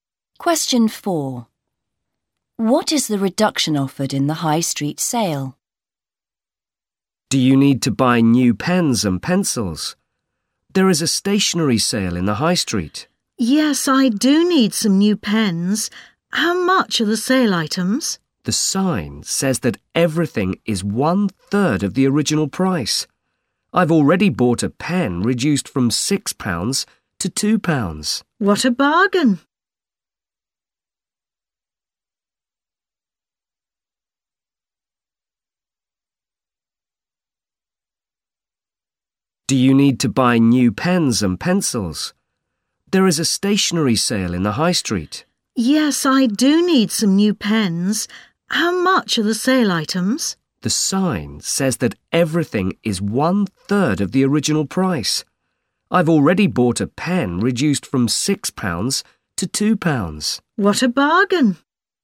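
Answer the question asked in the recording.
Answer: Two thirds off (everything is 1/3 of the original price)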